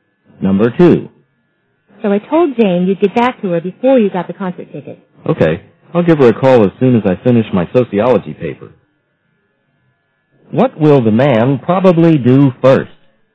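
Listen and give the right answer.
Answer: Finish his sociology paper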